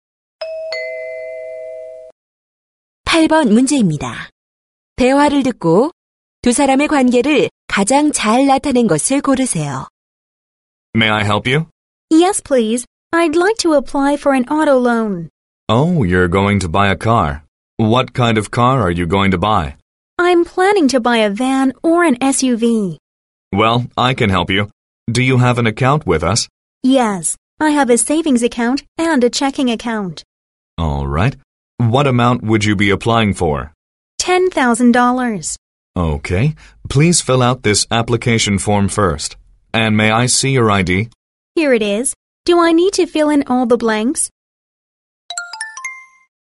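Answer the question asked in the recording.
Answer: 은행 직원과 고객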